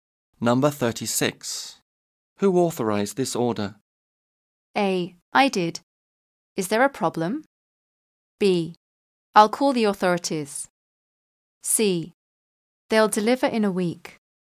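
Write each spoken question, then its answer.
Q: Who authorized this order?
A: A: I did. Is there a problem?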